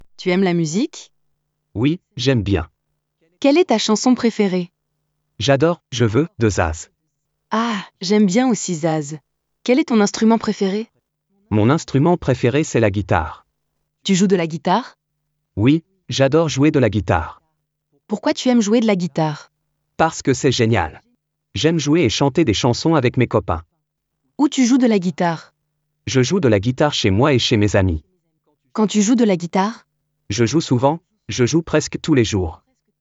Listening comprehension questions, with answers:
Écoute et réponds aux questions.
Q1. Tu aimes la musique?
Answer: Oui, j'aime bien.

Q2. Quelle est ta chanson préférée?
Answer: J'adore "Je veux" de Zaz.

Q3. Quel est ton instrument préféré?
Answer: Mon instrument préféré c'est la guitare

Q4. Tu joues de la guitare?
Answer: Oui, j'adore jouer de la guitare.

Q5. Pourquoi tu aimes jouer de la guitare?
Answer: Parce que c'est génial! J'aime jouer et chanter des chansons avec mes copains.

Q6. Où tu joues de la guitare?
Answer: Je joue de la guitare chez moi et chez mes amis.

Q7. Quand tu joues de la guitare?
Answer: Je joue souvent, je joue presque tous les jours.

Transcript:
J'adore "Je veux" de Zaz.
Ah! J'aime bien aussi Zaz. Quel est ton instrument préféré?
Mon instrument préféré c'est la guitare
Oui, j'adore jouer de la guitare.
Parce que c'est génial! J'aime jouer et chanter des chansons avec mes copains.
Je joue de la guitare chez moi et chez mes amis.
Je joue souvent, je joue presque tous les jours.

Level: 2o ESO